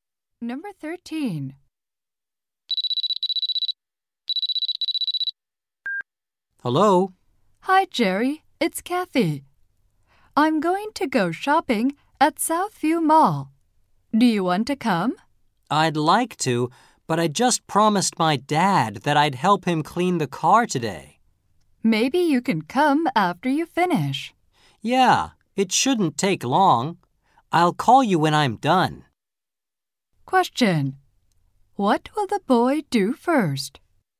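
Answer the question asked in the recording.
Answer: Help his dad clean the car.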